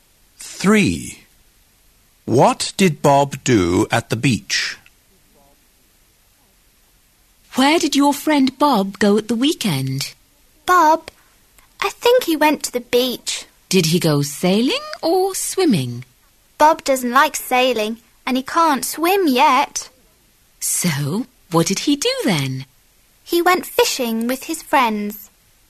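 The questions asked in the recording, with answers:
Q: What did Bob do at the beach?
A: He went fishing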